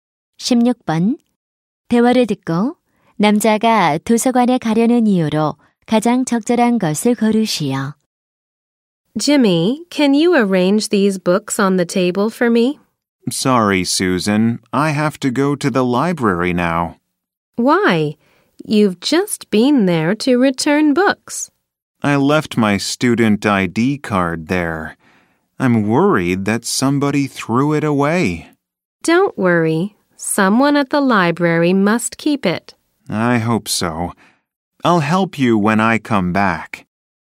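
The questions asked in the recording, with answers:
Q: 대화를 듣고 남자가 도서관에 가려는 이유로 가장 적절한 것을 고르시오.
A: 학생증을 두고 와서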